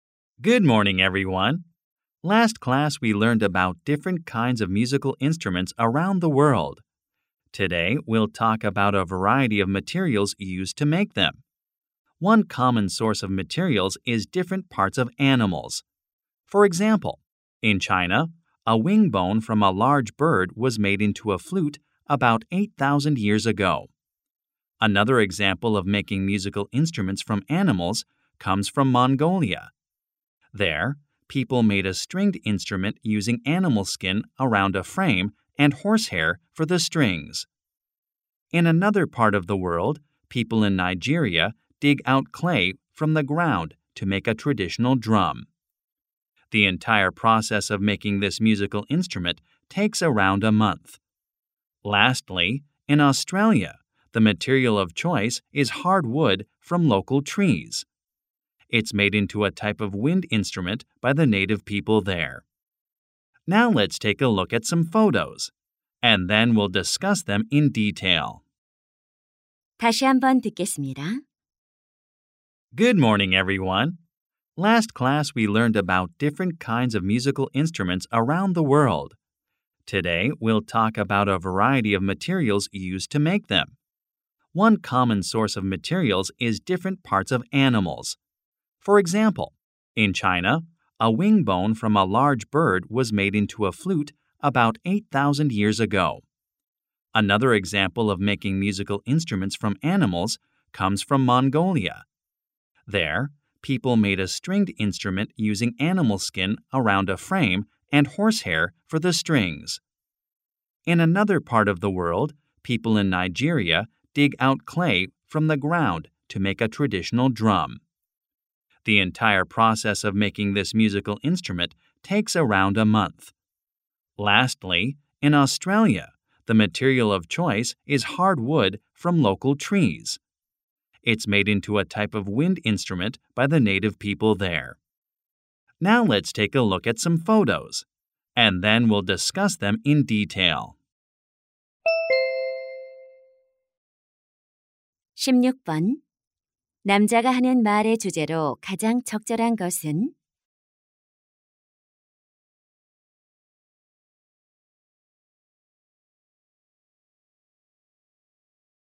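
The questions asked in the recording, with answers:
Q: 남자가 하는 말의 주제로 가장 적절한 것은?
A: 악기를 만드는 데 사용되는 다양한 재료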